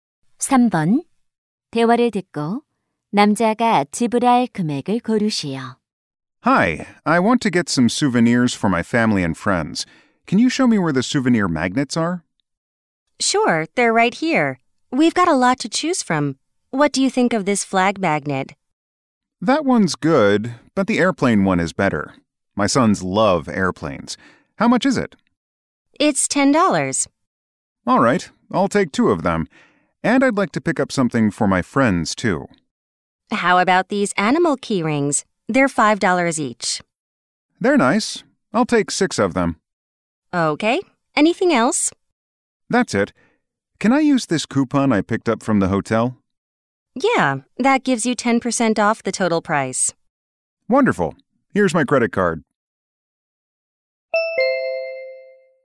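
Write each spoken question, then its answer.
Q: 대화를 듣고 남자가 지불할 금액을 고르시오.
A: $45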